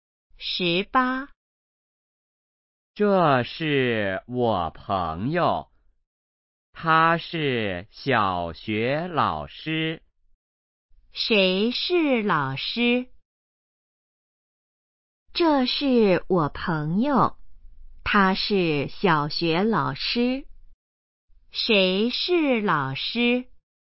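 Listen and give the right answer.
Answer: 他的朋友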